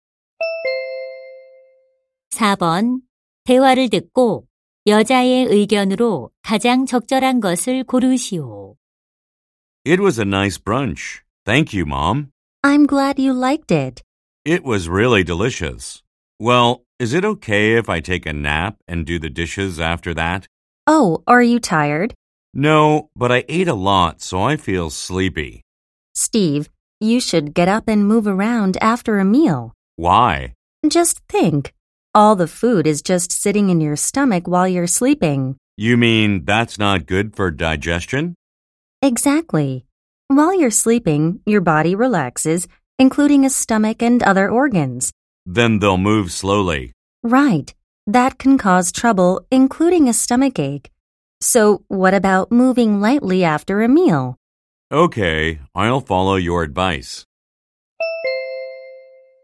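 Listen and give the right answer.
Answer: 식사 후에는 바로 자지 말고 가볍게 움직이는 것이 소화에 좋다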